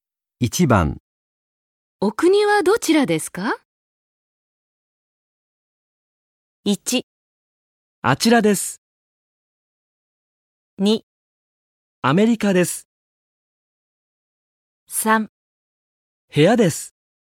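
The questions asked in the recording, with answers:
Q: お国はどちらですか?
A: 2: アメリカです。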